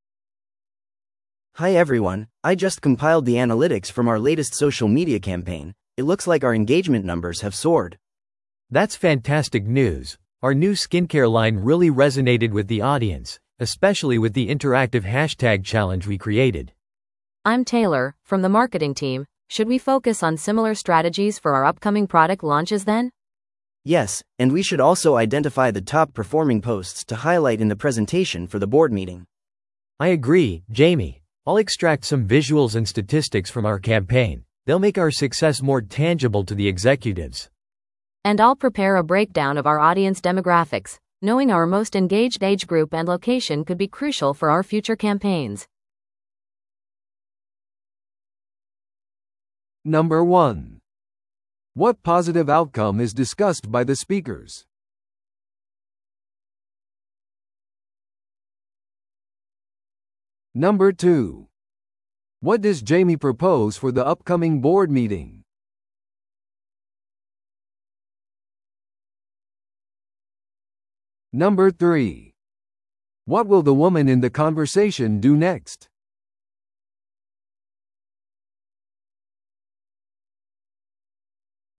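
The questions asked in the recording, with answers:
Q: What positive outcome is discussed by the speakers?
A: Social media engagement numbers soared

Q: What does Jamie propose for the upcoming board meeting?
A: Highlighting the top-performing posts in the presentation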